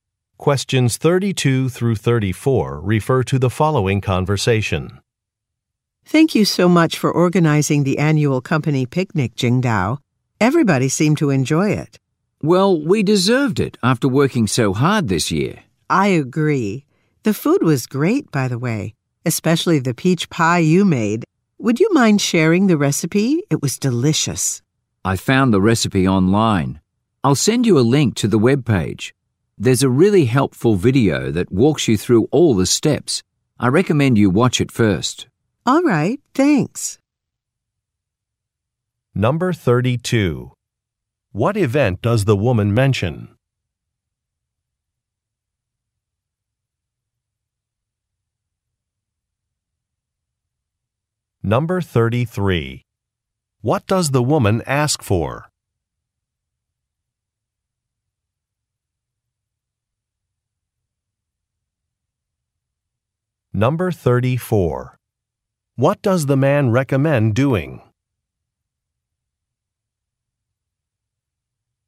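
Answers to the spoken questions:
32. The annual company picnic
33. A recipe
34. Watching a video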